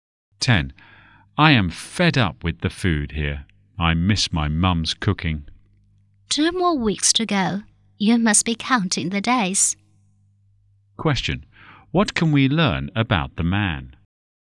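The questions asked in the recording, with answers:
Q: What can we learn about the man?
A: He misses home and is going home in two weeks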